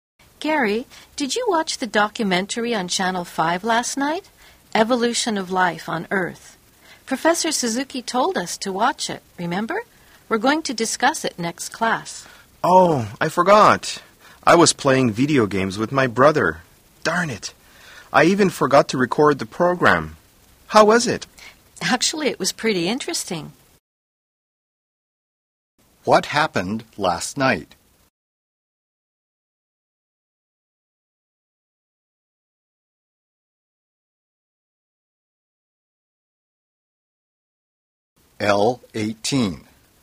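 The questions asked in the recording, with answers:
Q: What happened last night?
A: Gary forgot to watch the documentary because he was playing video games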